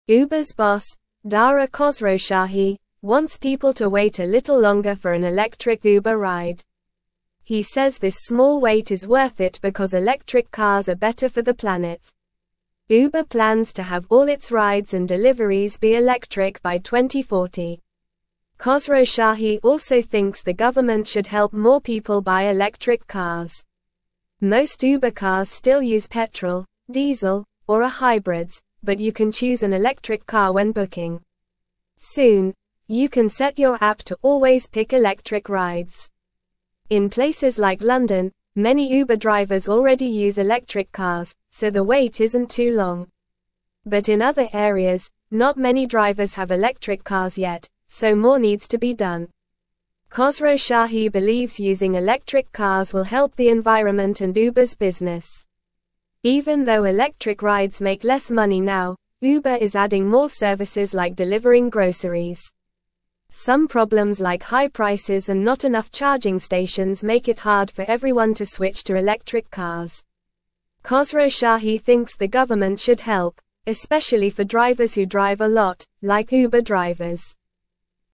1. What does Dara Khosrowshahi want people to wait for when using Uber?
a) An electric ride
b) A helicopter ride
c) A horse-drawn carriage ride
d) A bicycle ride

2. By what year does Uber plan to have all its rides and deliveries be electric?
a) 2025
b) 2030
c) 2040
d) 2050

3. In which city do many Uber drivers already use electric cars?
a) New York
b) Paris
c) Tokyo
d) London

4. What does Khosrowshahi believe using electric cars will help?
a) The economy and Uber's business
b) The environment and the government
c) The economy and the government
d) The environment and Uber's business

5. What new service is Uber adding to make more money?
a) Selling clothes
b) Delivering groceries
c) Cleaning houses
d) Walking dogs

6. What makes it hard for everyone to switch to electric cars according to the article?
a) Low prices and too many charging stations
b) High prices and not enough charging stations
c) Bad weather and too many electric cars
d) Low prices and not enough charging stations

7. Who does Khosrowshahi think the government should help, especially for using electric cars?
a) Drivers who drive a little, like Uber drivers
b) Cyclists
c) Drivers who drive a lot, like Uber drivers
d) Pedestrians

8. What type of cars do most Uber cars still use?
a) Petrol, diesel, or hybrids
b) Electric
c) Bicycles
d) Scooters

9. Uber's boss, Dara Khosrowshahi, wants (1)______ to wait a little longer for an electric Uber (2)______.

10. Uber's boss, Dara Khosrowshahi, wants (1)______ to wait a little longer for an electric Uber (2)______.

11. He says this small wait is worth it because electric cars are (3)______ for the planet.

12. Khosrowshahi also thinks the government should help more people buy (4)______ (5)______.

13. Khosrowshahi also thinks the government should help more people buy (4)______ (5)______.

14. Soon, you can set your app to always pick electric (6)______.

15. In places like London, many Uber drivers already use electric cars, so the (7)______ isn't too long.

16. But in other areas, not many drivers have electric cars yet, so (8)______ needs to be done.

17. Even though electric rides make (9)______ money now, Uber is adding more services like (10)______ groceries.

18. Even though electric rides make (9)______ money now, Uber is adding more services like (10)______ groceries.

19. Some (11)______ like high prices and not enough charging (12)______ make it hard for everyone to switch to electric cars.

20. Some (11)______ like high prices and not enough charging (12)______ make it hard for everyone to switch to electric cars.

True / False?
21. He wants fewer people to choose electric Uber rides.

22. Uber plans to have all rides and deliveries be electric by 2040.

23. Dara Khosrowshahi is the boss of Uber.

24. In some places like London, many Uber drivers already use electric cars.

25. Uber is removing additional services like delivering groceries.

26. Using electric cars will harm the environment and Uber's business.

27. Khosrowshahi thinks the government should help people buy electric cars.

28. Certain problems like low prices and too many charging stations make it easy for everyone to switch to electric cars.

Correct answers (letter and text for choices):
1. a) An electric ride
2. c) 2040
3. d) London
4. d) The environment and Uber's business
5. b) Delivering groceries
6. b) High prices and not enough charging stations
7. c) Drivers who drive a lot, like Uber drivers
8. a) Petrol, diesel, or hybrids
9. people
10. ride
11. better
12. electric
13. cars
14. rides
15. wait
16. more
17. less
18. delivering
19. problems
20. stations
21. False
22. True
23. True
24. True
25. False
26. False
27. True
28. False

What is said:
Uber's boss, Dara Khosrowshahi, wants people to wait a little longer for an electric Uber ride. He says this small wait is worth it because electric cars are better for the planet. Uber plans to have all its rides and deliveries be electric by 2040. Khosrowshahi also thinks the government should help more people buy electric cars.
Most Uber cars still use petrol, diesel, or are hybrids, but you can choose an electric car when booking. Soon, you can set your app to always pick electric rides. In places like London, many Uber drivers already use electric cars, so the wait isn't too long. But in other areas, not many drivers have electric cars yet, so more needs to be done.
Khosrowshahi believes using electric cars will help the environment and Uber's business. Even though electric rides make less money now, Uber is adding more services like delivering groceries. Some problems like high prices and not enough charging stations make it hard for everyone to switch to electric cars. Khosrowshahi thinks the government should help, especially for drivers who drive a lot, like Uber drivers.

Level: Level 2